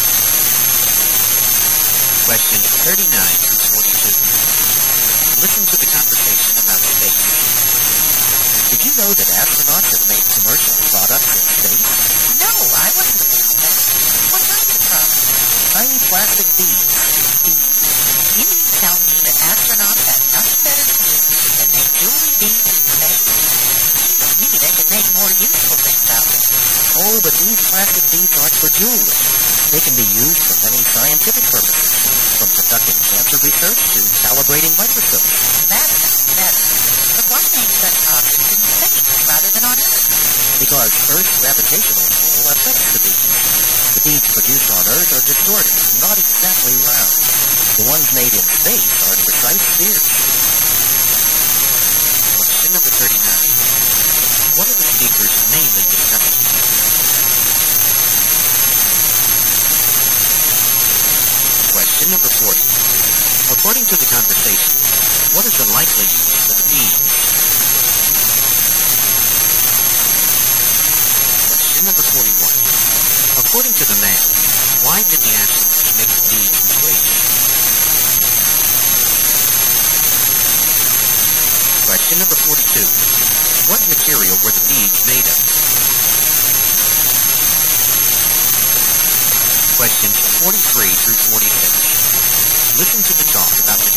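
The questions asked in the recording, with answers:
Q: What are the speakers mainly discussing?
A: Astronauts making plastic beads in space

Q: According to the conversation, what is the likely use for the beads?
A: Scientific purposes, such as cancer research and calibrating microscopes

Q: What material were the beads made of?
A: Plastic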